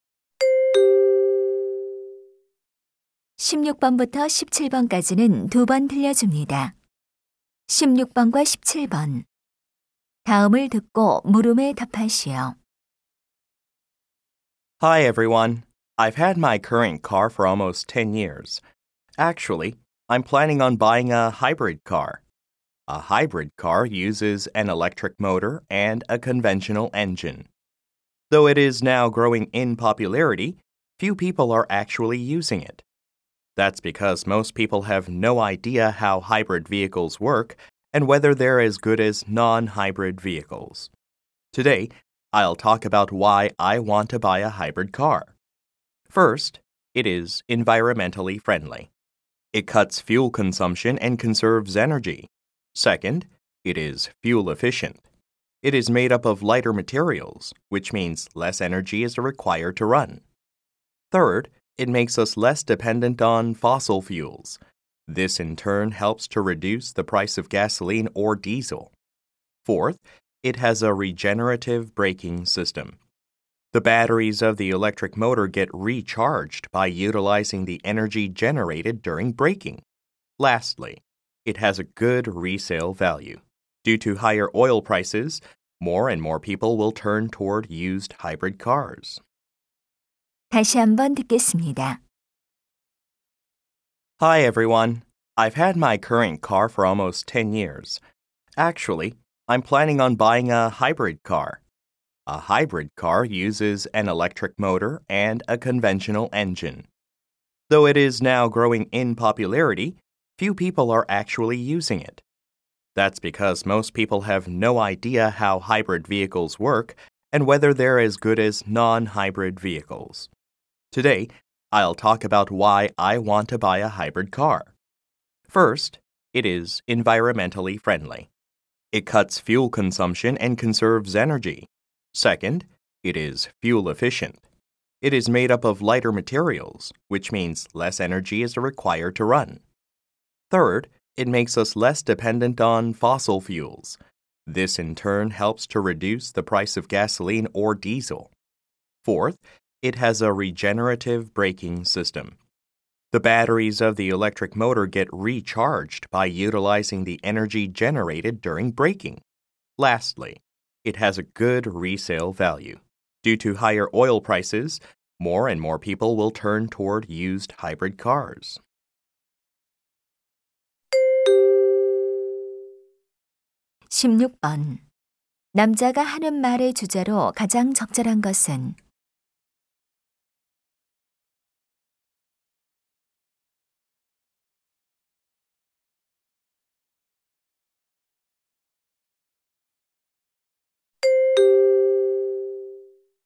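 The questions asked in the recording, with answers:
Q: 남자가 하는 말의 주제로 가장 적절한 것은?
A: 하이브리드 자동차를 사려는 이유(장점)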